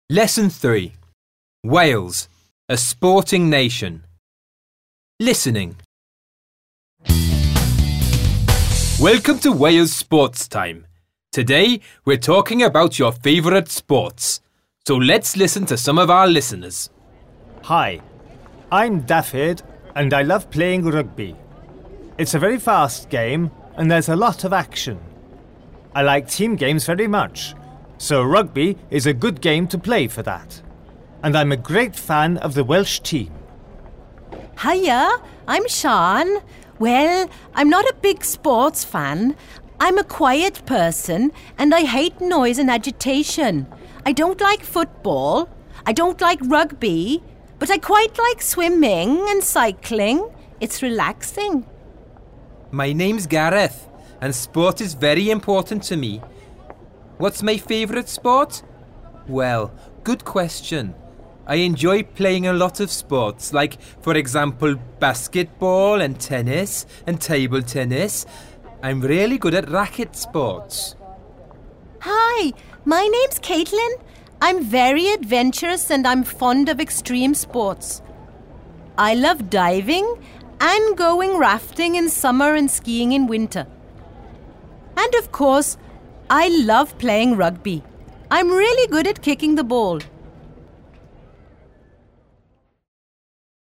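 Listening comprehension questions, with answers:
Listen and take notes about each teenager:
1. Dafydd: ...............................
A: loves playing rugby; likes team games; fan of the Welsh team

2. Siân: ...............................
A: not a big sports fan; doesn't like football or rugby; quite likes swimming and cycling

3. Gareth: ...............................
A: enjoys basketball, tennis and table tennis; really good at racket sports

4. Caitlin: ...............................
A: fond of extreme sports: diving, rafting, skiing; loves playing rugby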